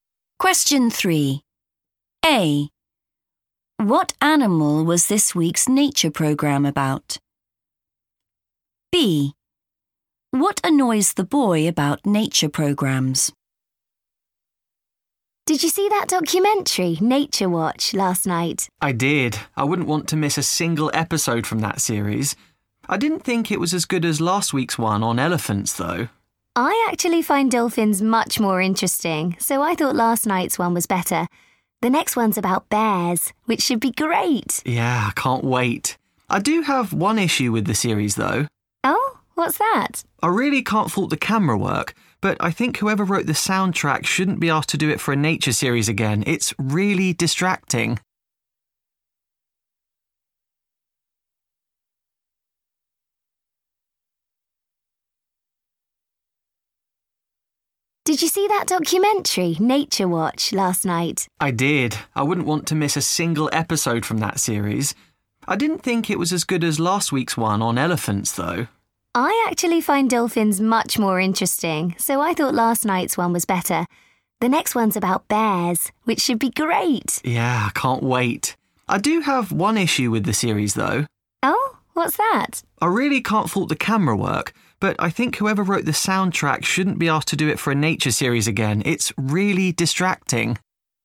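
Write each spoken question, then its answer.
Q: What animal was this week's nature program about?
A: dolphins

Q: What annoys the boy about nature programs?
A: the soundtrack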